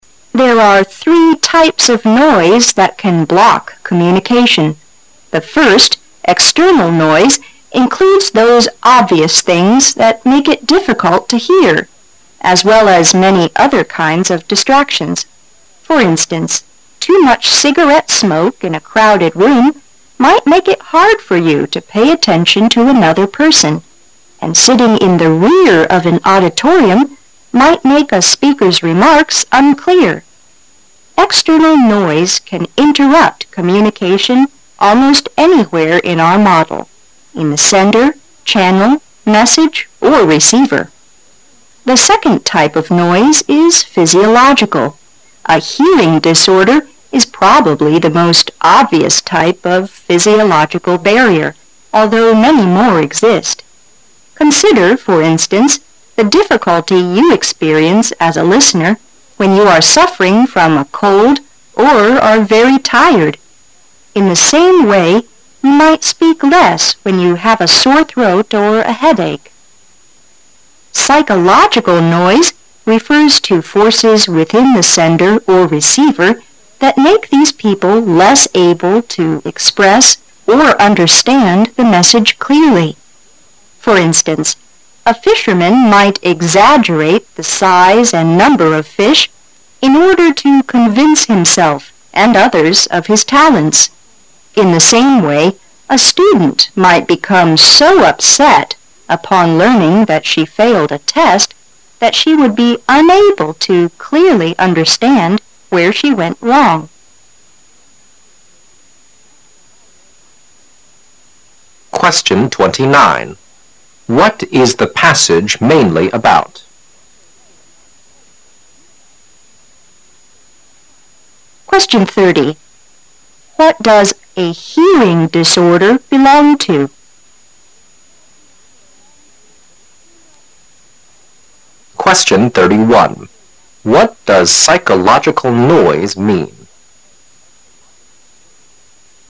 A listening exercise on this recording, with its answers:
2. What does a hearing disorder belong to?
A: Physiological noise.

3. What does psychological noise mean?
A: Various forces within a sender or receiver that cause them less able to communicate.

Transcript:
A
[解析] 29-31 There are three types of noise that can block communication. The first, external noise includes those obvious things that make it difficult to hear, as well as many other kinds of distractions. For instance, too much cigarette smoke in a crowded room might make it hard for you to pay attention to another person, and sitting in the rear of an auditorium might make a speaker's remarks unclear. External noise can interrupt communication almost anywhere in our model -- in the sender, channel, message, or receiver. The second type of noise is physiological. A hearing disorder is probably the most obvious type of physiological barrier, although many more exist. Consider, for instance, the difficulty you experience as a listener when you are suffering from a cold or are very tired. In the same way you might speak less when you have a sore throat or a headache. Psychological noise refers to forces within the sender or receiver that make these people less able to express or understand the message clearly. For instance, a fisherman might exaggerate the size and number of fish caught in order to convince himself and others of his talents. In the same way, a student might become so upset upon learning that she failed a test that she would be unable to clearly understand where she went wrong. 29. What is the passage mainly about?